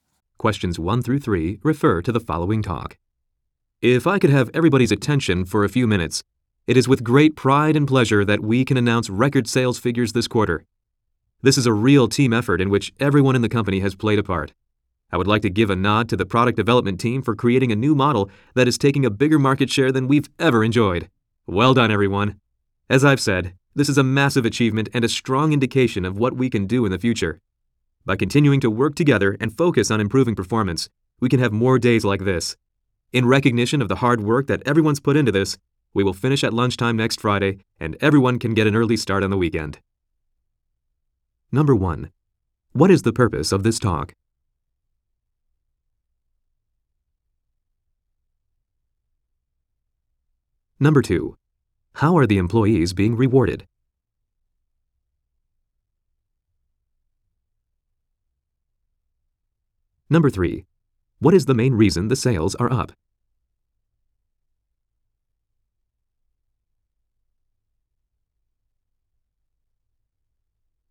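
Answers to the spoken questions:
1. To announce record sales figures
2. They will finish at lunchtime next Friday
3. A new model from the product development team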